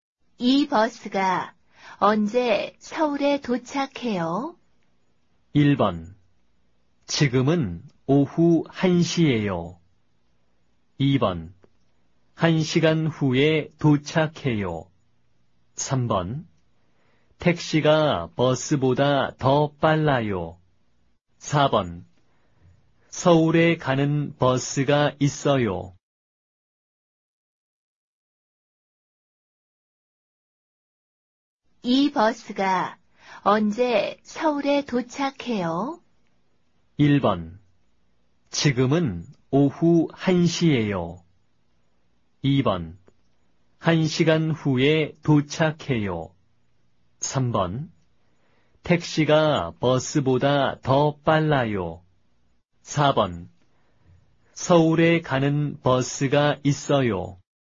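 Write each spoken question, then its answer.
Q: 이 버스가 언제 서울에 도착해요?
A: 2: 1시간 후에 도착해요.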